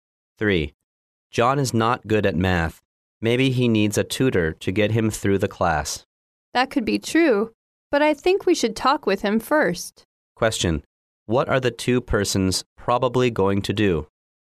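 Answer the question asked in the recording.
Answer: Talk with John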